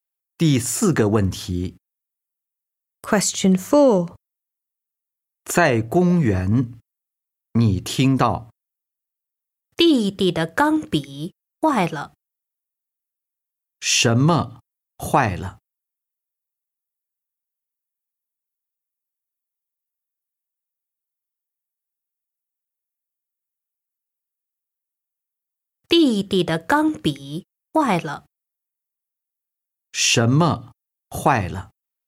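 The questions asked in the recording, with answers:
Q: 什么坏了?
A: 弟弟的钢笔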